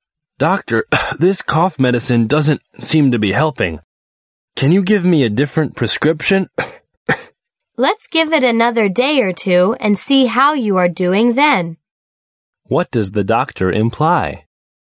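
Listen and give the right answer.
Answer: The patient should keep taking the same medicine for another day or two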